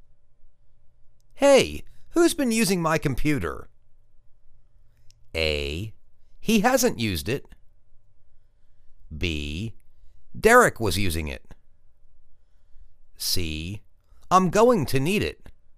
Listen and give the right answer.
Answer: Derek was using it.